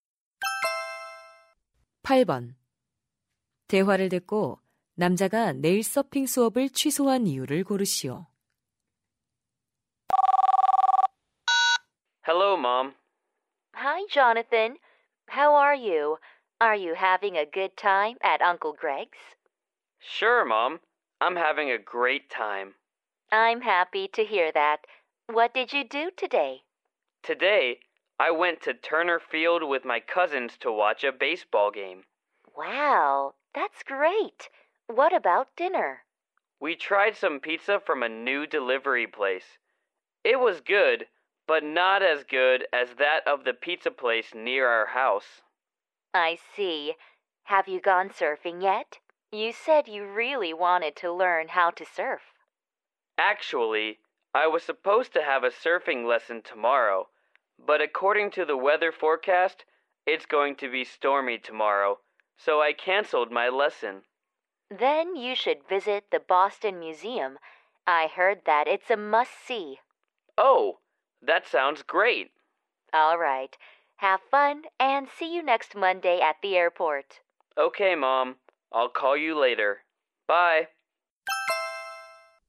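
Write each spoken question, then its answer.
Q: 대화를 듣고 남자가 내일 서핑 수업을 취소한 이유를 고르시오.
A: 내일 폭풍이 올 것이라는 일기 예보 때문에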